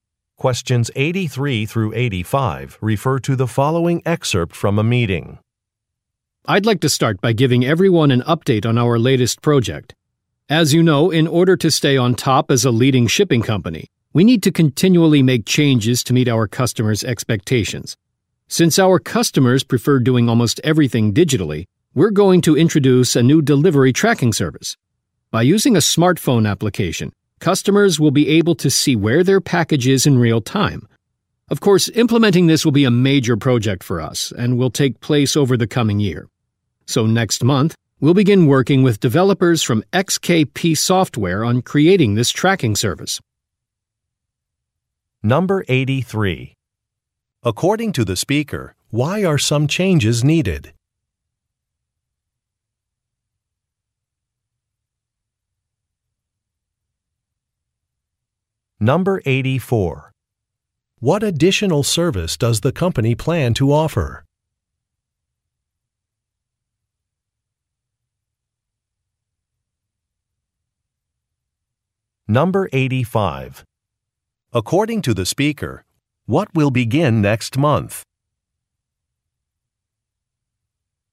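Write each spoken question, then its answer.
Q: According to the speaker, why are some changes needed?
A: To meet customers' expectations

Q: What additional service does the company plan to offer?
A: Real-time package tracking on a smartphone app

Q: According to the speaker, what will begin next month?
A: Work with developers from XKP Software on the tracking service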